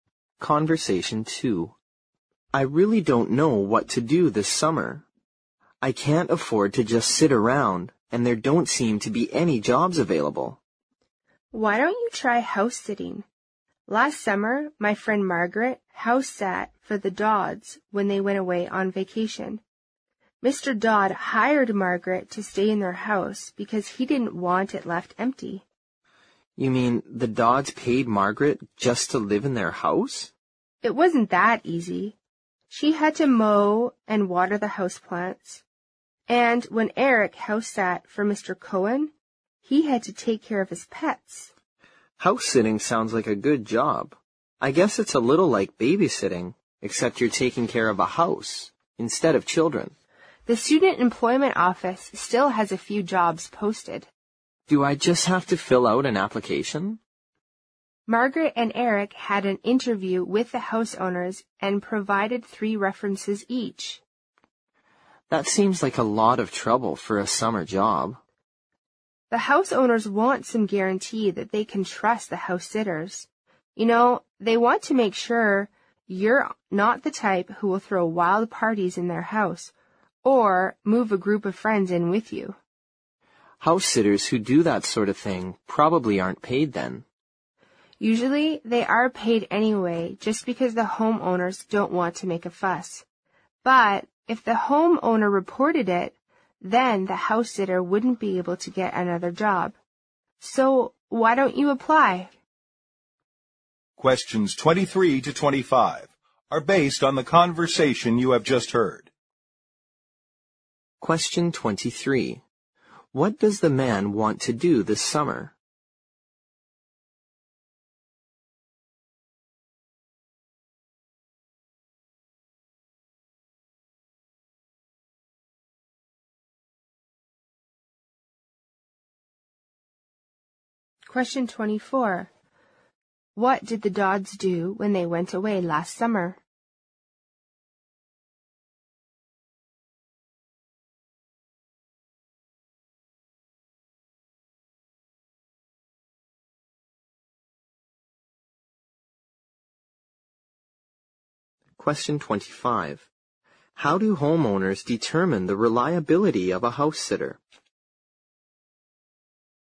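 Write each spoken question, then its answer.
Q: What does the man want to do this summer?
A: Find a summer job

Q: What did the Dodds do when they went away last summer?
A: They hired Margaret to house-sit

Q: How do homeowners determine the reliability of a house sitter?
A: Through an interview and references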